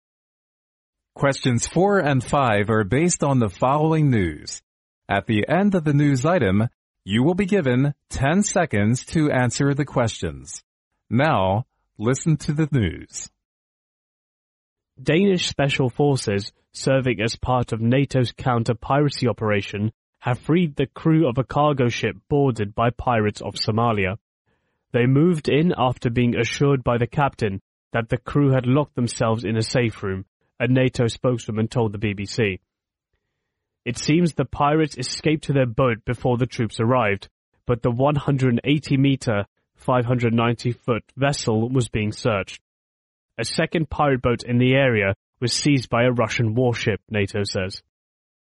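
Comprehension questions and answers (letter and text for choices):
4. What is mainly talked about in the news item?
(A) Russian army have freed the crew of a ship seized by Somalia pirates.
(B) Danish special forces have captured Somalia pirates on a cargo ship.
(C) Somalia pirates have seized the crew of a cargo ship.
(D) Danish Special Forces have freed the crew of a cargo ship seized by Somalia pirates.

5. We can infer from the news that the pirates left the cargo ship possibly_____.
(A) after the troops arrived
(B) before the troops arrived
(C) when the troops arrived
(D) after fighting with the troops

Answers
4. (D) Danish Special Forces have freed the crew of a cargo ship seized by Somalia pirates.
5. (B) before the troops arrived

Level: 专业四级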